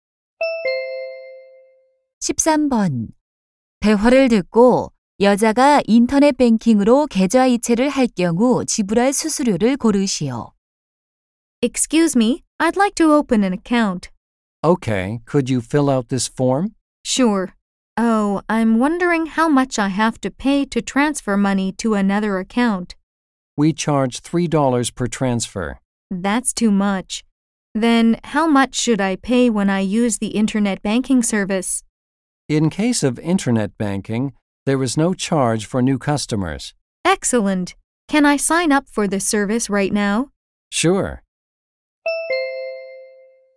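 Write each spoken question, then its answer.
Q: 대화를 듣고 여자가 인터넷 뱅킹으로 계좌 이체를 할 경우 지불할 수수료를 고르시오.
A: 없음(0달러)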